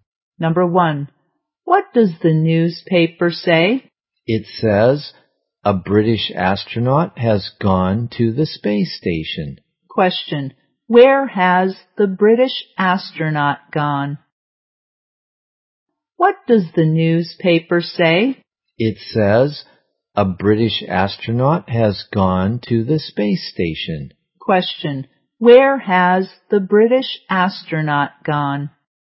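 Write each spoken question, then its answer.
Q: Question, where has the British astronaut gone?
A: To the space station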